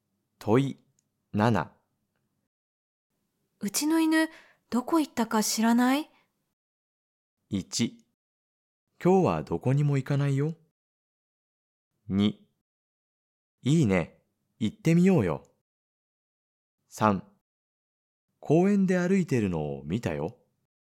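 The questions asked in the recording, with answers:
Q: うちの犬どこ行ったか知らない?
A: 3: 公園で歩いてるのを見たよ。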